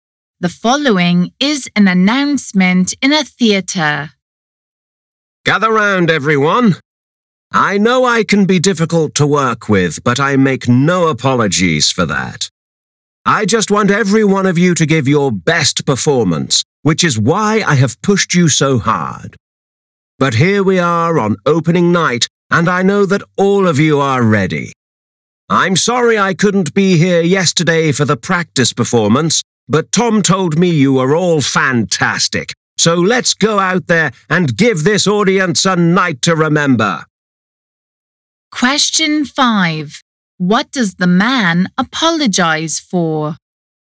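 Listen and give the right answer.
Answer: Missing the practice performance yesterday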